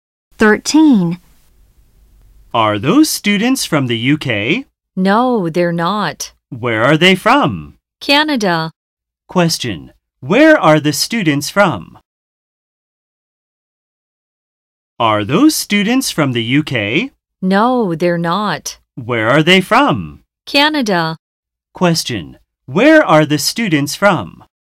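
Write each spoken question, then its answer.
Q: Where are the students from?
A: Canada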